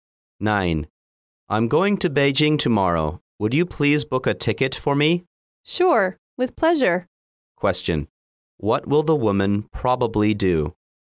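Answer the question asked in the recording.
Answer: Book a ticket to Beijing for the man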